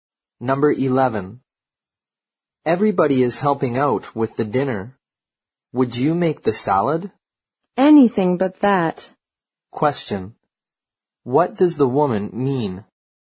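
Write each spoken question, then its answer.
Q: What does the woman mean?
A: She doesn't want to make the salad.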